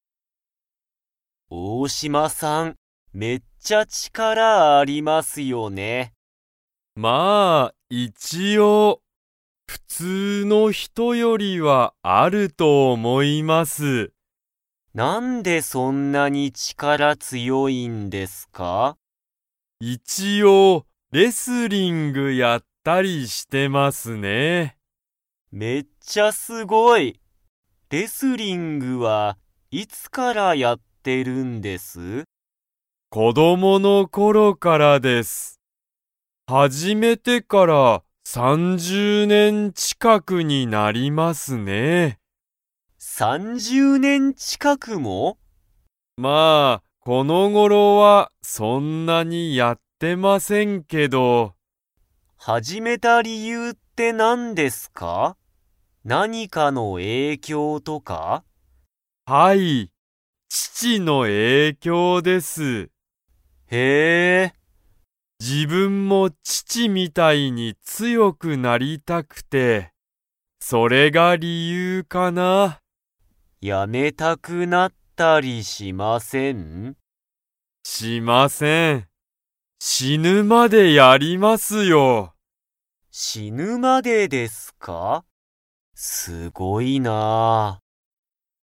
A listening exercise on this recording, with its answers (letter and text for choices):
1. 大島(おおしま)さんは、レスリングを始(はじ)めてから____近(ちか)くになる。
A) 3日みっか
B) 30さんじゅう日にち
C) 3さん年(ねん)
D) 30さんじゅう年(ねん)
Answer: D) 30さんじゅう年(ねん)

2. 大島(おおしま)さんは、レスリングを辞(や)めたいですか?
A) はい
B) いいえ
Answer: B) いいえ

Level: Level 2